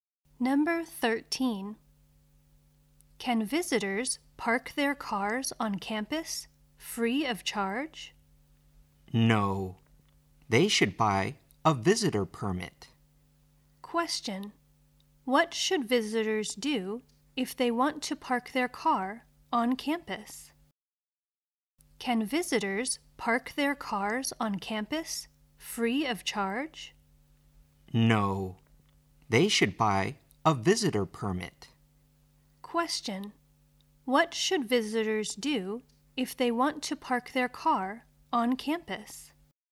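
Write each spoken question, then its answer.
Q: What should visitors do if they want to park their car on campus?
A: Buy a visitor permit.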